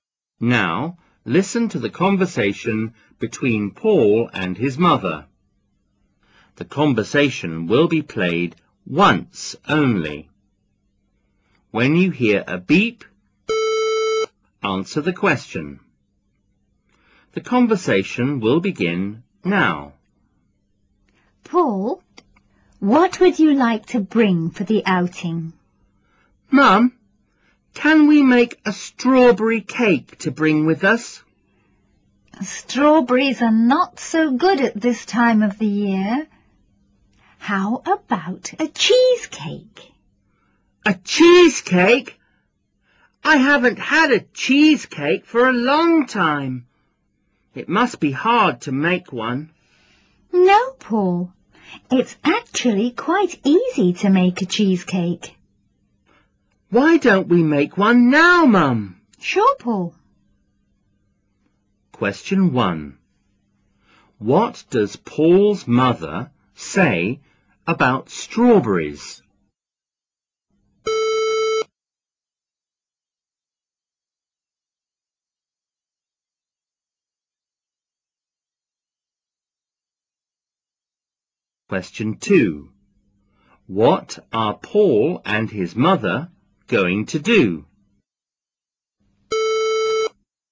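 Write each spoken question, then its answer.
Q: What does Paul's mother say about strawberries?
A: They are not so good at this time of the year.

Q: What are Paul and his mother going to do?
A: Make a cheesecake.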